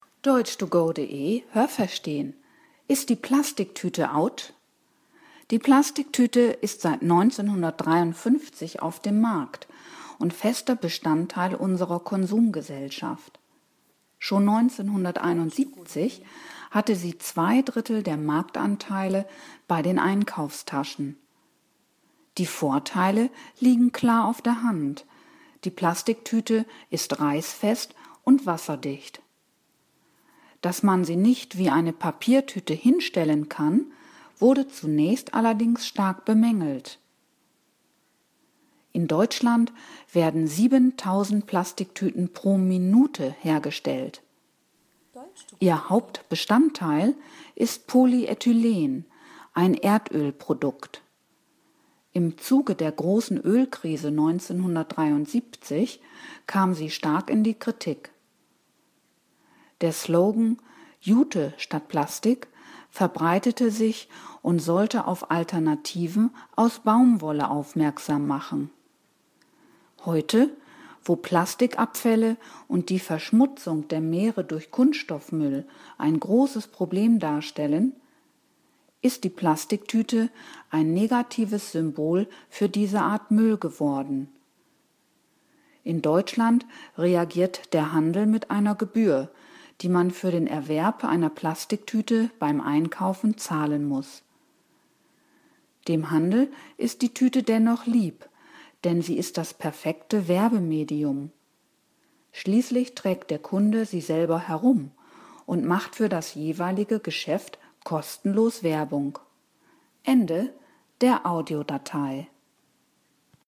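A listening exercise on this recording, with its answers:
Haben Sie das gehört? Stimmt diese Aussage?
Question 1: Die Plastiktüte ist seit 1971 auf dem Markt.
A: Falsch

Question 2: Plastiktüten reißen nicht leicht ein und lassen kein Wasser durch.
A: Richtig

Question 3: In Deutschland werden 7.000 Plastiktüten pro Stunde hergestellt.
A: Falsch

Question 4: Plastiktüten bestehen hauptsächlich aus Polyethylen (PE), das aus Erdöl gewonnen wird.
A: Richtig

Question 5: Im Zuge der Erdölkrise in den siebziger Jahren wurde der Slogan „Jute und Plastik" populär.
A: Falsch

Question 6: Die Plastiktüte ist heute zu einem Symbol für Luftverschmutzung geworden.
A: Falsch

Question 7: Für den Handel sind Plastiktüten ein hervorragendes Werbemedium.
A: Richtig

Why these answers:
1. Es gibt sie schon seit 1953.
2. Sie sind reißfest und wasserdicht.
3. Diese Zahl wird pro Minute produziert.
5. Es hieß damals „Jute statt Plastik". 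Jute und Baumwolle sollten anstatt Plastik verwendet werden.
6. Sie ist ein Symbol für Plastikabfälle und Kunststoffmüll.

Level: C (schwer)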